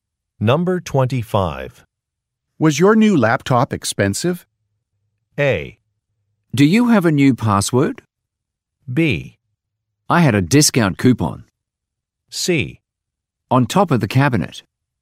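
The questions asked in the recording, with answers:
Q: Was your new laptop expensive?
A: B: I had a discount coupon.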